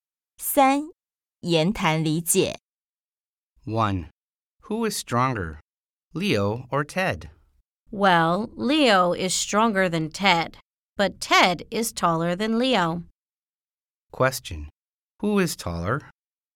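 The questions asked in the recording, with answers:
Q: Who is taller?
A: Ted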